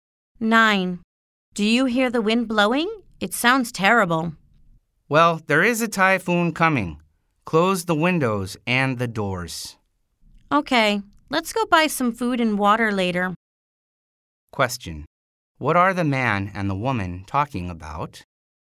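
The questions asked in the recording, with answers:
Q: What are the man and the woman talking about?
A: A coming typhoon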